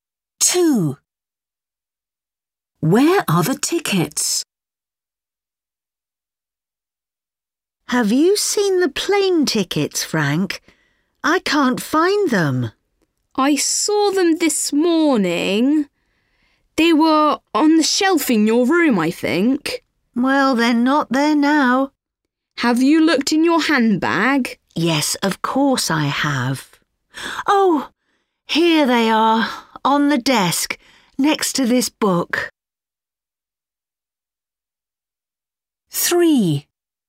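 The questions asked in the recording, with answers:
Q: Where are the tickets?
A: On the desk, next to the book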